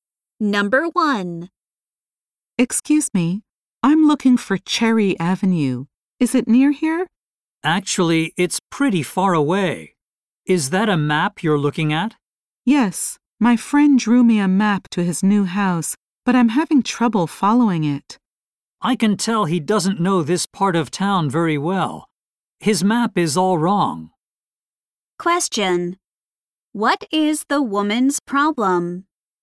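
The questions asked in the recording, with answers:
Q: What is the woman's problem?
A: Her friend's map to his new house is wrong.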